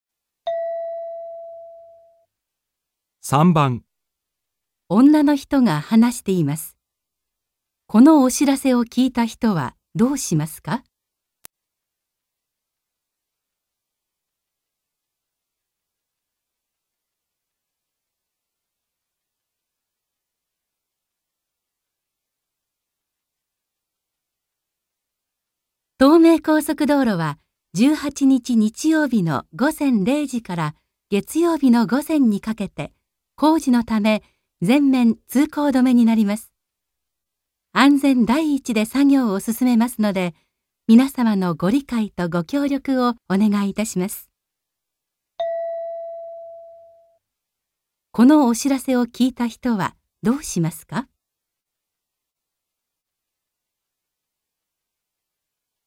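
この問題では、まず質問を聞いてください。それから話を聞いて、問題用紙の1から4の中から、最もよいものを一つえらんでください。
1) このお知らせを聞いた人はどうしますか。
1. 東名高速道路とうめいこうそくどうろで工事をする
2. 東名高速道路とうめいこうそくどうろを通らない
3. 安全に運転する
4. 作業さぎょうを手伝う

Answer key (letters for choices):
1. 2

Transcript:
F: 東名高速道路は18日日曜日の午前0時から月曜日の午前にかけて、 工事のため、 全面通行止めになります。 安全第一 で作業を進めますので、皆様のご理解とご協力をお願いいたします。

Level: N2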